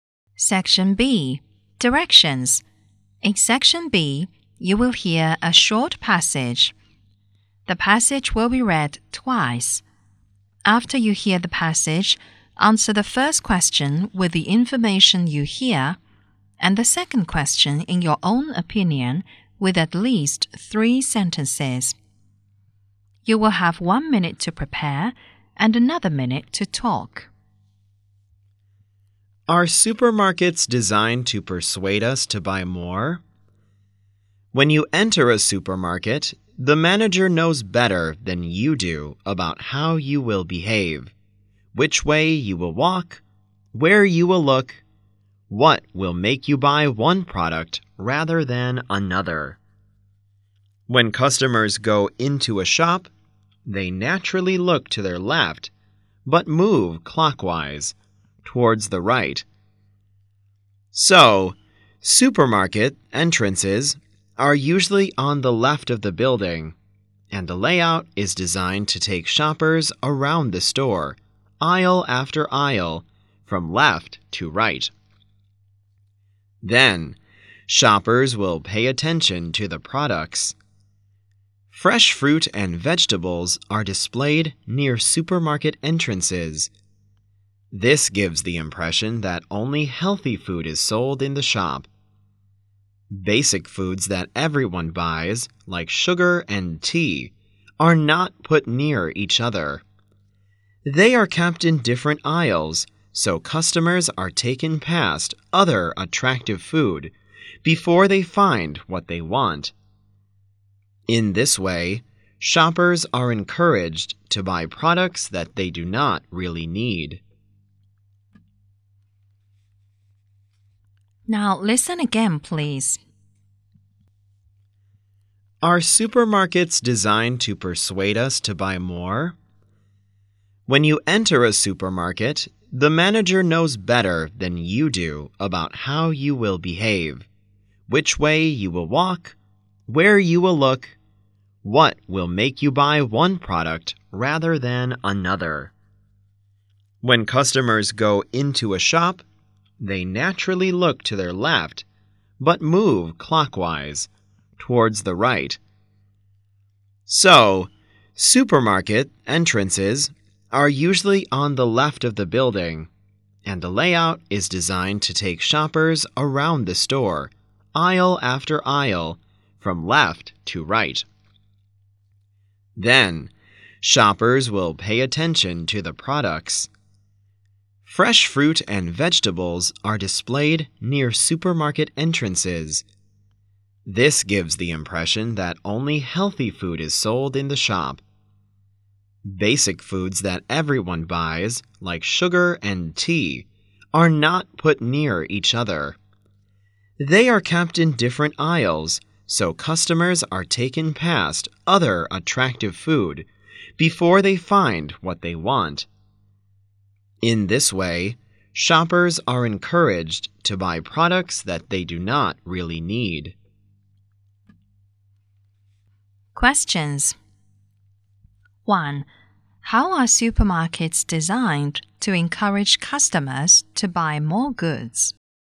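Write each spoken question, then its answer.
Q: How are supermarkets designed to encourage customers to buy more goods?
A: Entrances are on the left, and the layout takes shoppers through every aisle from left to right. Fresh fruit and vegetables are near the entrance. Basic foods like sugar and tea are kept in different aisles, so shoppers pass other attractive food and buy things they don't need.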